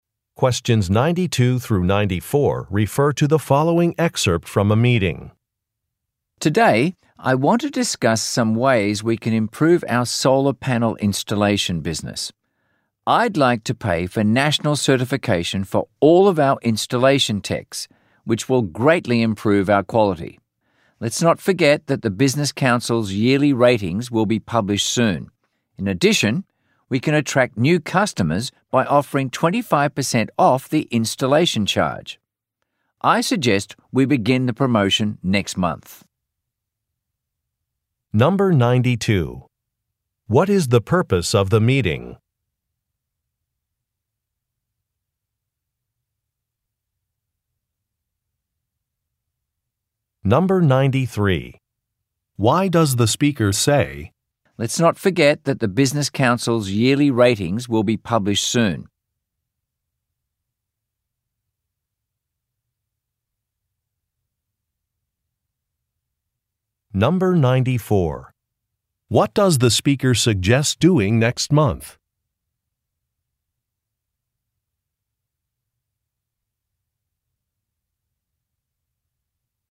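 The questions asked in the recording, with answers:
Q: What is the purpose of the meeting?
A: To discuss ways to improve their solar panel installation business

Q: What does the speaker suggest doing next month?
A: Starting a promotion offering 25% off the installation charge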